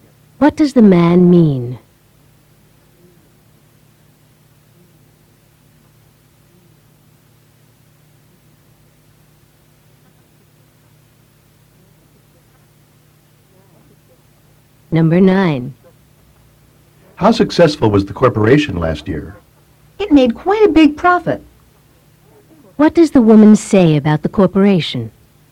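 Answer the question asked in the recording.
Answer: It made a large profit.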